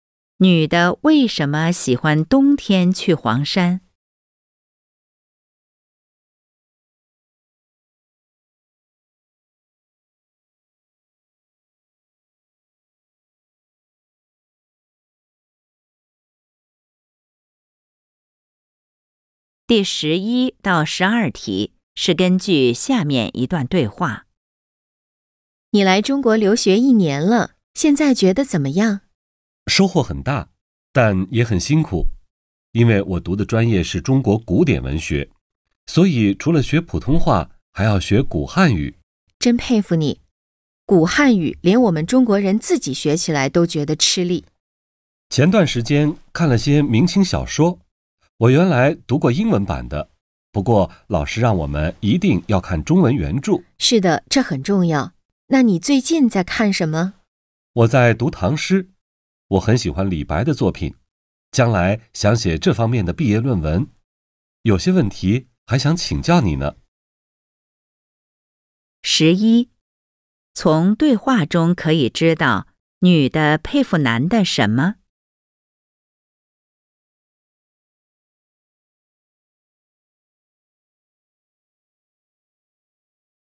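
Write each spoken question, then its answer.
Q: 从对话中可以知道女的佩服男的什么?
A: 他学古汉语(读中国古典文学)

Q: 关于男的,从对话中可以知道什么?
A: 他喜欢李白的作品,想写这方面的毕业论文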